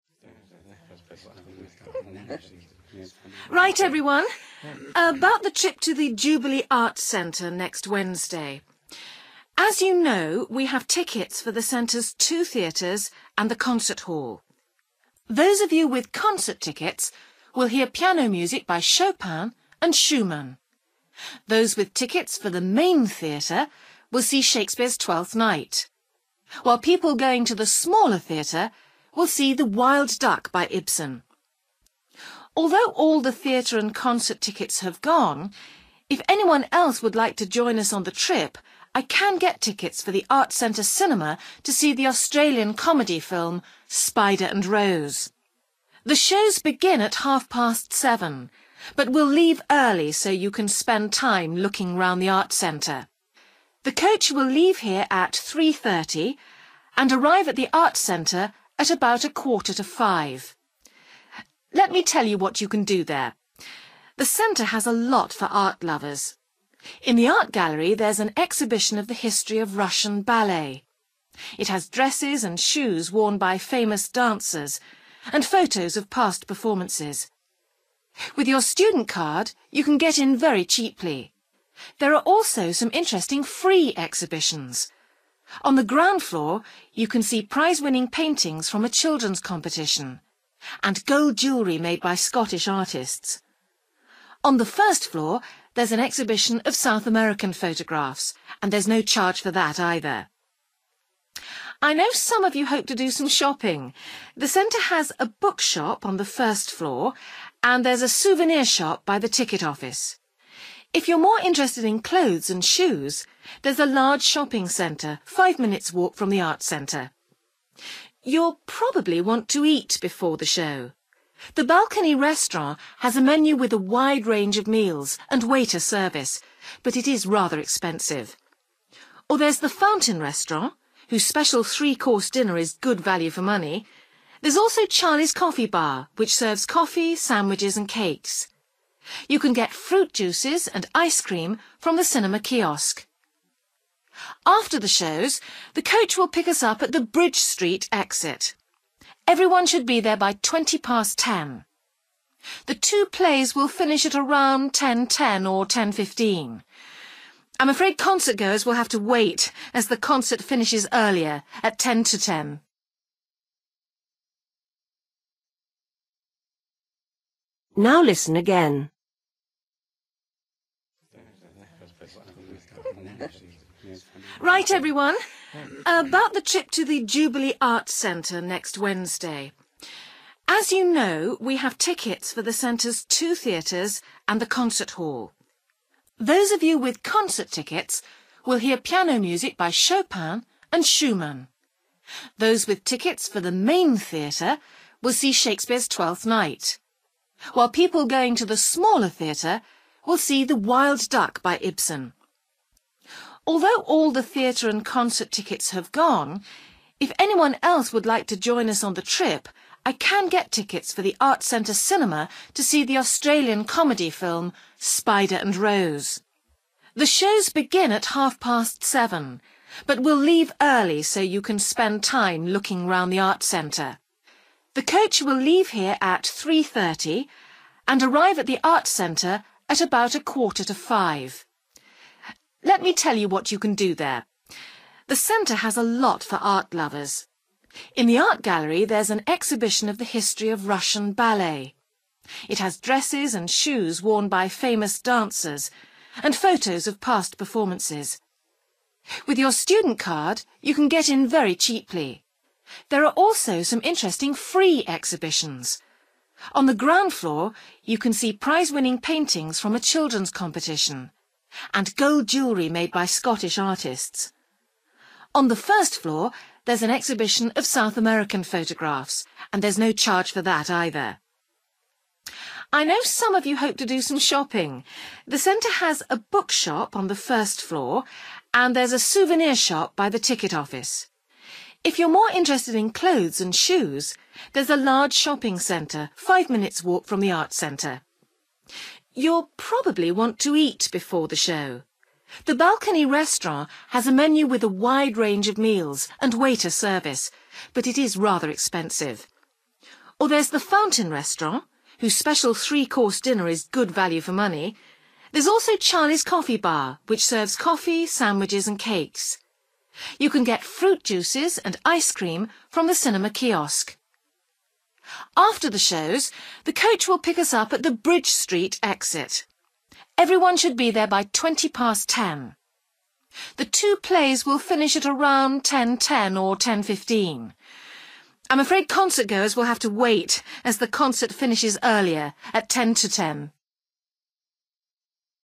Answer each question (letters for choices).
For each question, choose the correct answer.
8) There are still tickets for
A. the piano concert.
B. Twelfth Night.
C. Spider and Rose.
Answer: C

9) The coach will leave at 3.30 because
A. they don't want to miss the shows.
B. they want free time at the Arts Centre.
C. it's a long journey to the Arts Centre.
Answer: B

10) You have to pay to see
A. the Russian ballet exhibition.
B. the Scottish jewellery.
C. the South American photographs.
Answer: A

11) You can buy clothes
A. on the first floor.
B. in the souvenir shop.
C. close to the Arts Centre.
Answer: C

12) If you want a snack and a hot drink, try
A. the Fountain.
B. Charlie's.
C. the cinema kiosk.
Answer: B

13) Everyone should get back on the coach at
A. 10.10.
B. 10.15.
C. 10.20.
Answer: C

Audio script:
Woman: Right, everyone – about the trip to the Jubilee Arts Centre next Wednesday.
As you know, we have tickets for the Centre's two theatres and the concert hall. Those of you with concert tickets will hear piano music by Chopin and Schumann. Those with tickets for the main theatre will see Shakespeare's Twelfth Night, while people going to the smaller theatre will see The Wild Duck by Ibsen. Although all the theatre and concert tickets have gone, if anyone else would like to join us on the trip I can get tickets for the Arts Centre cinema to see the Australian comedy film, Spider and Rose.
The shows begin at half past seven, but we'll leave early so you can spend time looking round the Arts Centre. The coach will leave here at 3.30 and arrive at the Arts Centre at about a quarter to five. Let me tell you what you can do there.
The Centre has a lot for art-lovers. In the Art Gallery there's an exhibition of the history of Russian ballet. It has dresses and shoes worn by famous dancers and photos of past performances. With your student card, you can get in very cheaply. There are also some interesting free exhibitions. On the ground floor you can see prize-winning paintings from a children's competition, and gold jewellery made by Scottish artists. On the first floor there's an exhibition of South American photographs, and there's no charge for that either.
I know some of you hope to do some shopping. The Centre has a bookshop on the first floor and there's a souvenir shop by the ticket office. If you're more interested in clothes and shoes there's a large shopping centre five minutes' walk from the Arts Centre.
You'll probably want to eat before the show. The Balcony Restaurant has a menu with a wide range of meals and waiter service, but it is rather expensive. Or there's the Fountain Restaurant whose special three-course dinner is good value for money. There's also Charlie's coffee bar which serves coffee, sandwiches and cakes. You can get fruit juices and ice cream from the cinema kiosk.
After the shows the coach will pick us up at the Bridge Street exit. Everyone should be there by twenty past ten. The two plays will finish at around 10.10 or 10.15. I'm afraid concert-goers will have to wait, as the concert finishes earlier, at ten to ten.

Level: B1